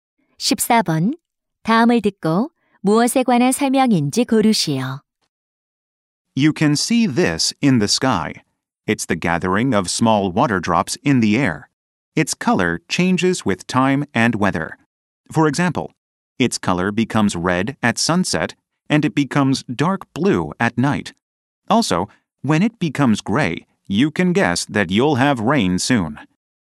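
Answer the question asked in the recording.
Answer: 구름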